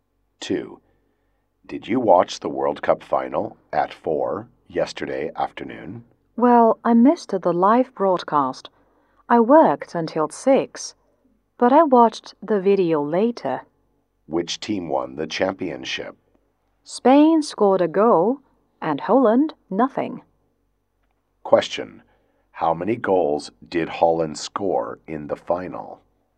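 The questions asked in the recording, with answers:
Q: How many goals did Holland score in the final?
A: None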